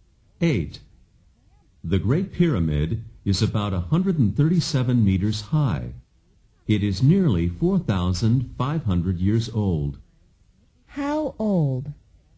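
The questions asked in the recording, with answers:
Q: How old?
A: Nearly 4,500 years old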